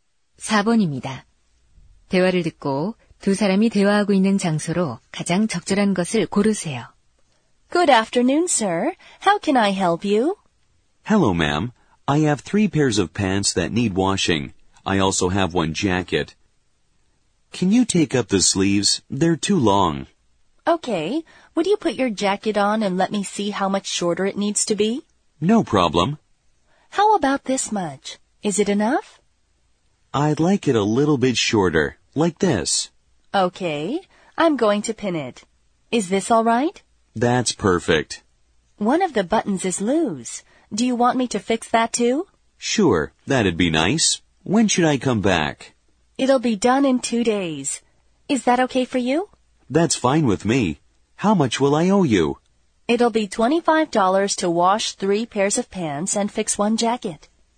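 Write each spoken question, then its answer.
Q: 대화를 듣고 두 사람이 대화하고 있는 장소로 가장 적절한 것을 고르세요.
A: 세탁소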